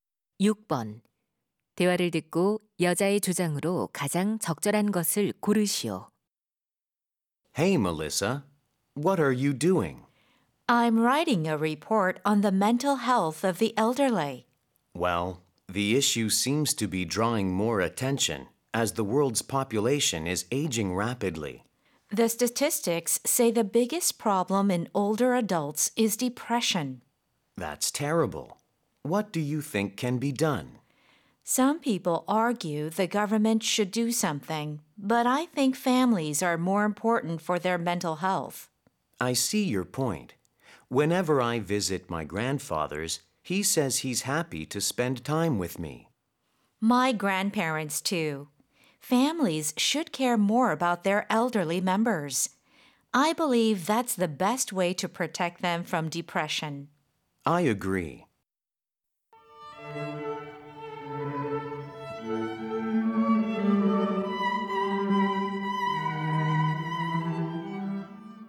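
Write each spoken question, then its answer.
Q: 대화를 듣고 여자의 주장으로 가장 적절한 것을 고르시오.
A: 노인의 정신 건강을 위해 가족이 더 관심을 가져야 한다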